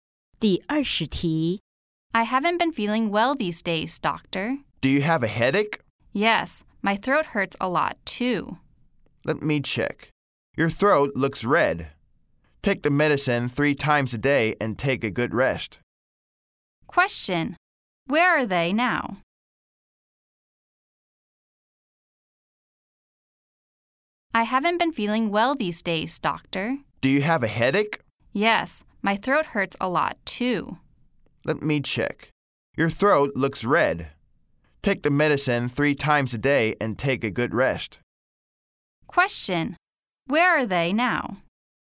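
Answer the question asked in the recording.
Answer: At a clinic (doctor's office)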